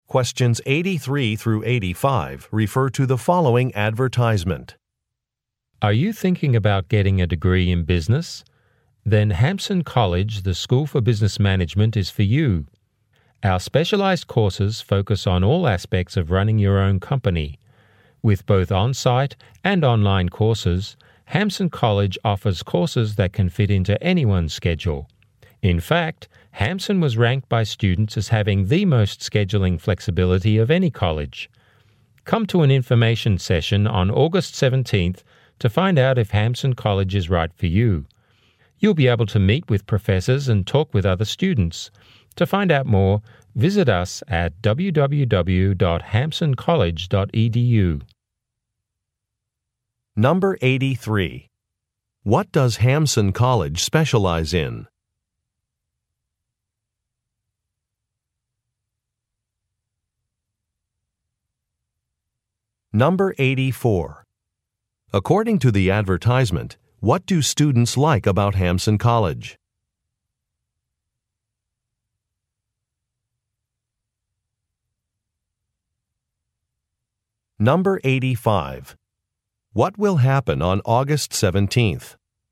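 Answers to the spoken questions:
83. Business management
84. Its flexible scheduling
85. An information session will be held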